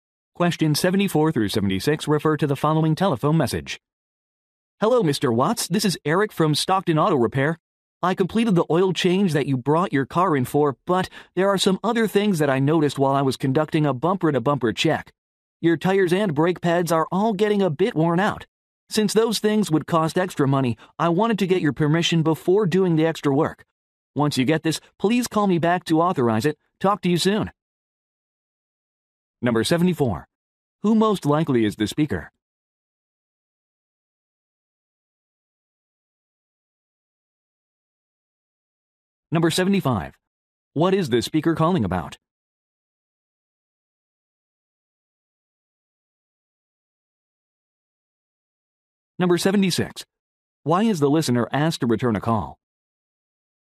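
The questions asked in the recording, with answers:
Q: Who most likely is the speaker?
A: An auto mechanic

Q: What is the speaker calling about?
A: Additional repairs needed on the car (worn tires and brake pads)

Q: Why is the listener asked to return a call?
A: To authorize the extra work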